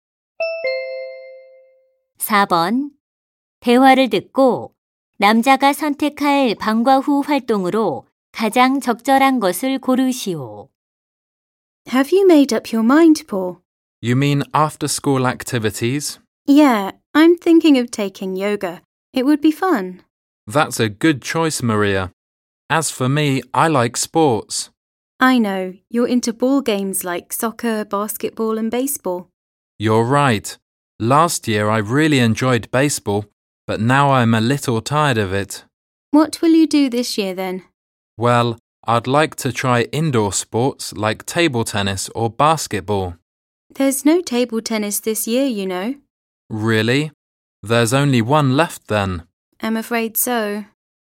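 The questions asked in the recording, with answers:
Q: 대화를 듣고 남자가 선택할 방과 후 활동으로 가장 적절한 것을 고르시오.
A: 농구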